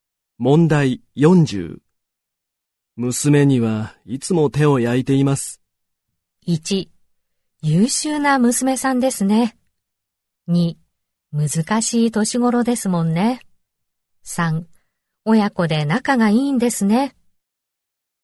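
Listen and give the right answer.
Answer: 2: 難しい年頃ですもんね。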